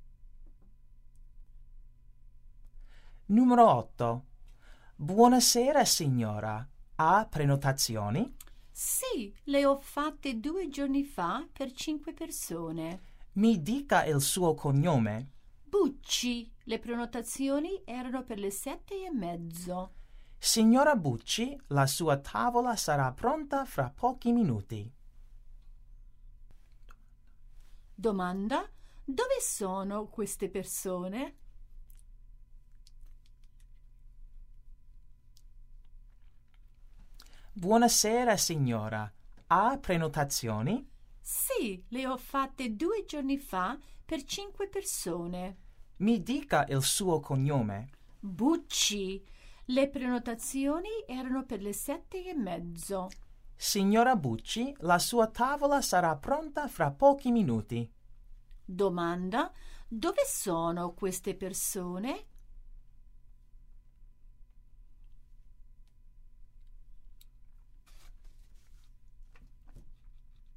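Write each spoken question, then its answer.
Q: Dove sono queste persone?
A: In un ristorante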